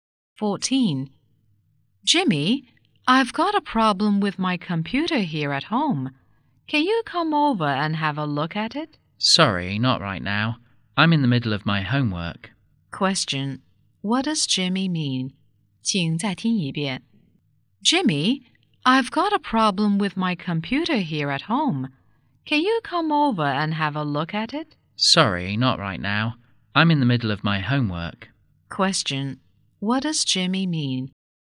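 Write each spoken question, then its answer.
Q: what does Jimmy mean?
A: He can't help right now because he is doing his homework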